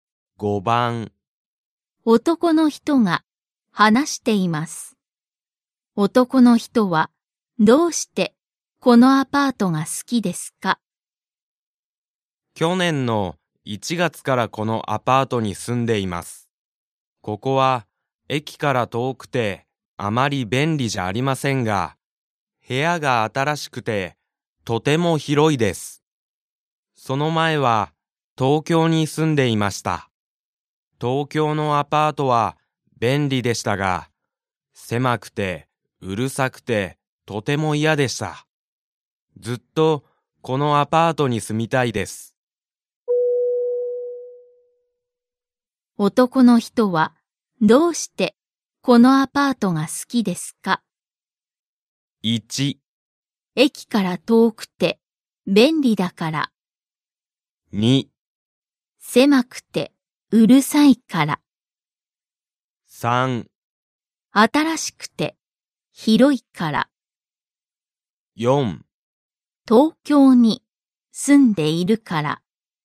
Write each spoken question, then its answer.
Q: 男の人はどうしてこのアパートが好きですか?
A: Because it's new and big. This is correct, so Mark, 正しい。